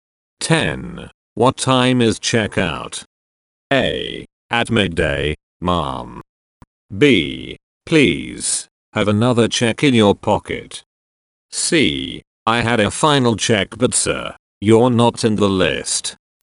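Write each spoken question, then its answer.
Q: What time is checkout?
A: A: At midday, ma'am.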